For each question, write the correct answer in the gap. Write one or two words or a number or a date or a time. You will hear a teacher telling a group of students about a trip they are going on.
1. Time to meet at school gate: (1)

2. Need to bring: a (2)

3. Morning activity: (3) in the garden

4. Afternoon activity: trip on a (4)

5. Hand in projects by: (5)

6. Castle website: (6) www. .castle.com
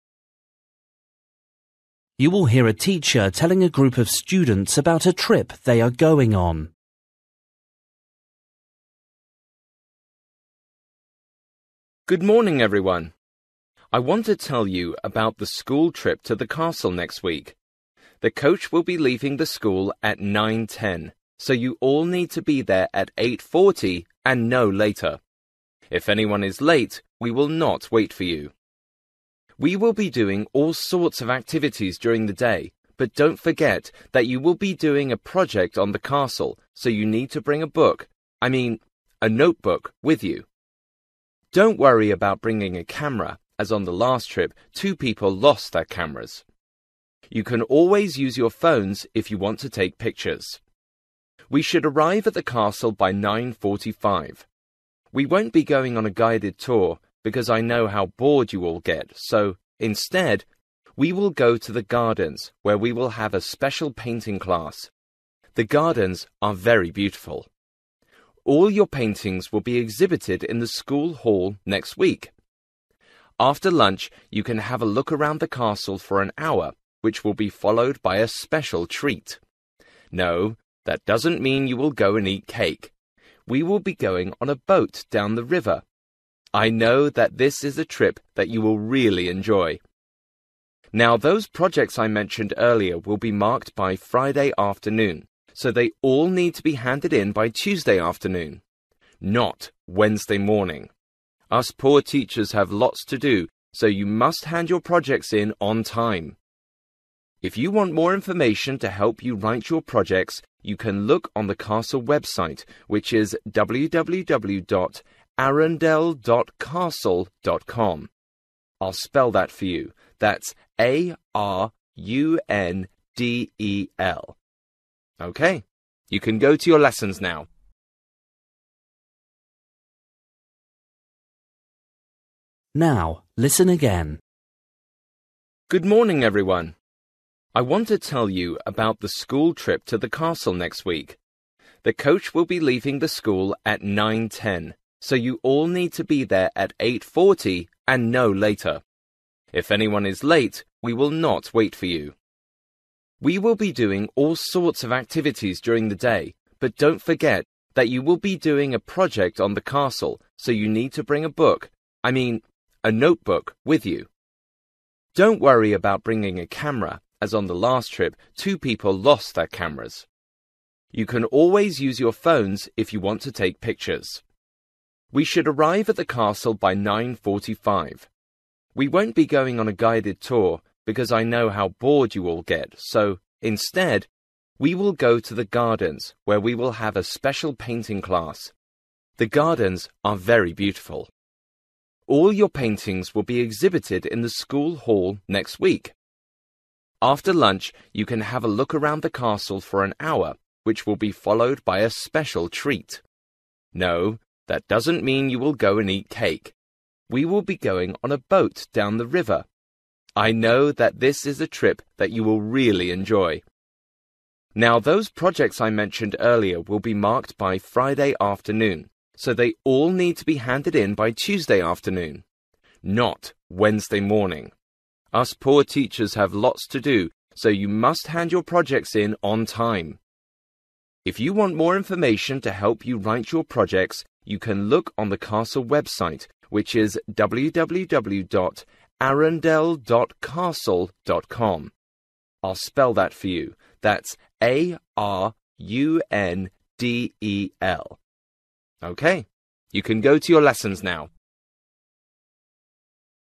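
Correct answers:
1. 8:40
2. notebook
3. painting class
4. boat
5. Tuesday afternoon
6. arundel

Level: Luyện nghe trình độ B1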